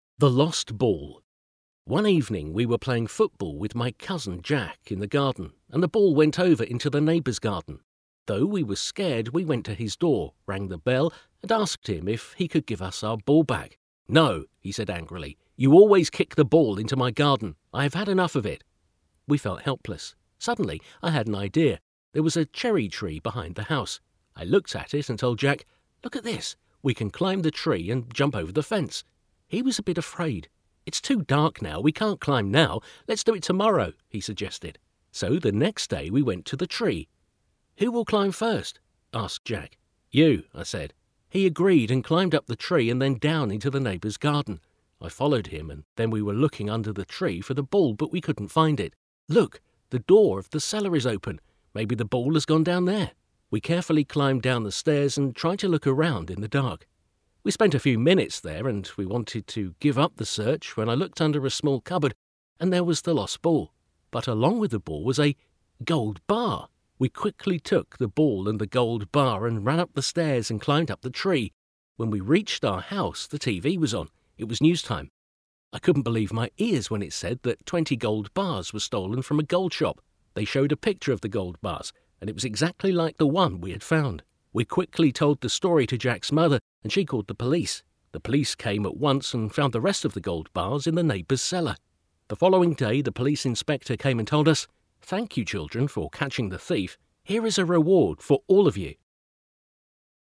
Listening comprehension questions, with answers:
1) Who was the speaker playing with and where?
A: With his cousin, in their garden.

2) What happened to the ball?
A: It went over into the neighbour's garden.

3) Why didn't the neighbour help them? What did he say?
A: He was angry and he said that they always kick the ball into his garden.

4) What did the speaker suggest to Jack?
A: Climbing a (cherry) tree and jumping over the fence.

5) Why did they wait until the next day?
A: Because it was too dark.

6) What did they find under the tree?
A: Nothing.

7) What did they find in the cellar?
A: Their ball and a gold bar.

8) What did they hear on the TV when they went back to their house?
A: 20 gold bars were stolen from a gold shop.

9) Who called the police and what did they find?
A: Jack's mother and they found the rest of the gold bars.

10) Who gave the children a reward? When and why?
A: The police (inspector), the following day for catching the thief.

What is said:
The Lost Ball
One evening we were playing football with my cousin, Jack, in their garden and the ball went over into the neighbour's garden. Though we were scared, we went to his door, rang the bell and asked him if he could give us our ball back. "No," he said angrily "You always kick the ball into my garden. I have enough of it." We felt helpless. Suddenly, I had an idea. There was a cherry tree behind the house. I looked at it and told Jack "Look at this. We can climb the tree and jump over the fence." He was a bit afraid "It's too dark now, we can't climb now. Let's do it tomorrow" he suggested.
So the next day we went to the tree early. "Who will climb first?" asked Jack. "You," I said. He agreed and climbed up the tree and then down into the neighbour's garden. I followed him and then we were looking under the tree for the ball but we couldn't find it. "Look, the door of the cellar is open. Maybe the ball has gone down there." We carefully climbed down the stairs and tried to look around in the dark. We spent a few minutes there and we wanted to give up the search when I looked under a small cupboard and there was the lost ball. But along with the ball was a ... gold bar! We quickly took both the ball and the gold bar and ran up the stairs and climbed up the tree again. When we reached our house the TV was on. It was news time. I couldn't believe my ears when it said that 20 gold bars were stolen from a gold shop. They showed a picture of the gold bars and it was exactly like the one we had found. We quickly told the story to Jack's mother and she called the police. The police came at once and found the rest of the gold bars in the neighbour's cellar.
The following day the police inspector came and told us "Thank you, children, for catching the thief. Here is a reward for all of you."
The lost ball
1. With his cousin, in their garden.

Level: B1 alapfok